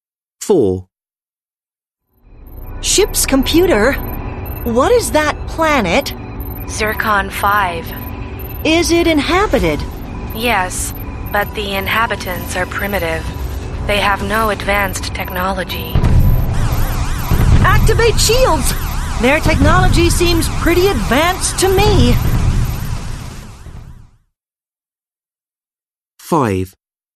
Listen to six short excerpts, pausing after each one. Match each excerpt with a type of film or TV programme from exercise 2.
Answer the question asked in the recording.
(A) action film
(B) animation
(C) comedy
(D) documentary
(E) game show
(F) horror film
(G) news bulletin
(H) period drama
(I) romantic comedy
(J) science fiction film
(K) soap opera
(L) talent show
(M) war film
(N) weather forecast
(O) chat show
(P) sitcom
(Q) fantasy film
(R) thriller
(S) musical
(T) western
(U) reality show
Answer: (J) science fiction film

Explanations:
Woman: Ship's computer, what is that planet? Computer: Zircon 5. Woman: Is it inhabited? Computer: Yes, but the inhabitants are primitive. They have no advanced technology. Woman: Activate shields! Their technology seems pretty advanced to me!

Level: Lớp 10